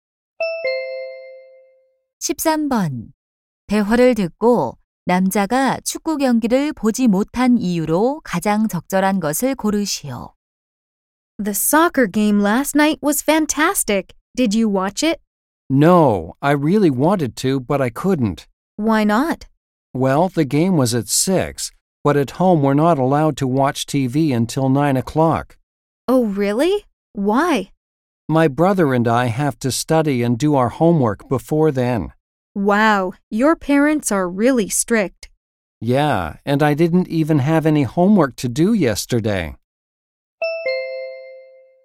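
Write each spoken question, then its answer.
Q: 대화를 듣고 남자가 축구 경기를 보지 못한 이유로 가장 적절한 것을 고르시오.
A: 집에서 9시 전에는 TV를 볼 수 없어서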